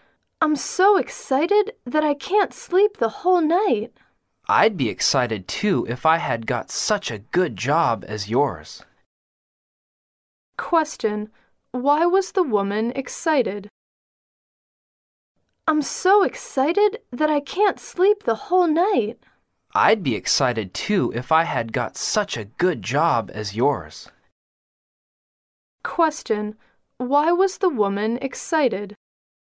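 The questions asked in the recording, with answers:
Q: why was the woman excited?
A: She got a good job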